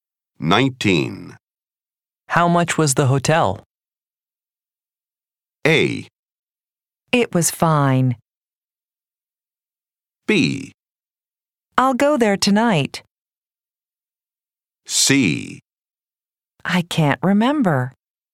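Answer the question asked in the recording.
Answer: C: I can't remember.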